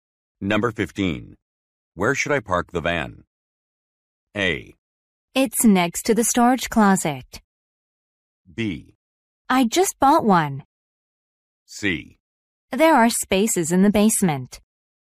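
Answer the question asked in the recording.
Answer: C: There are spaces in the basement.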